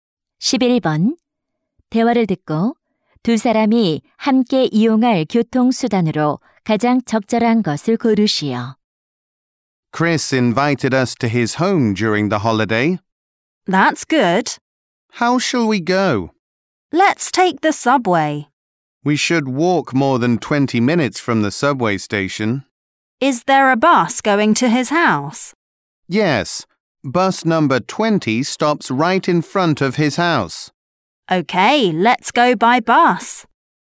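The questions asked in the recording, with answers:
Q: 대화를 듣고 두 사람이 함께 이용할 교통수단으로 가장 적절한 것을 고르시오.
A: 버스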